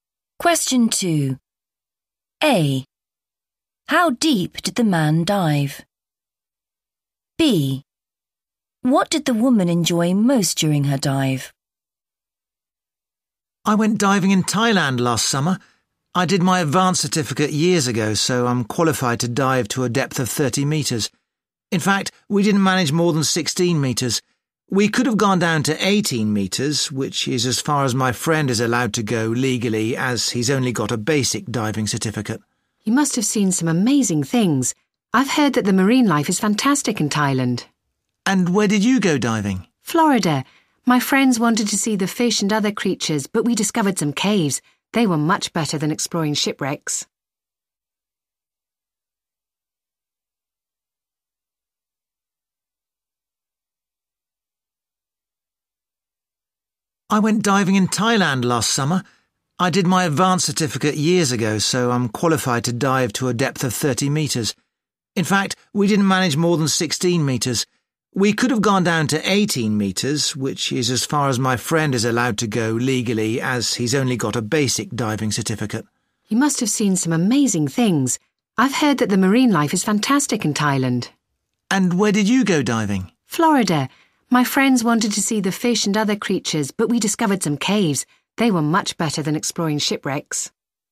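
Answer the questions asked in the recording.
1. 16 metres
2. the caves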